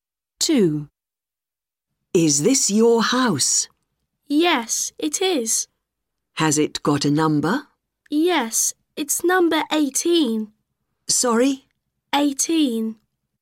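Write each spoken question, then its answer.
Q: Has it got a number?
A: 18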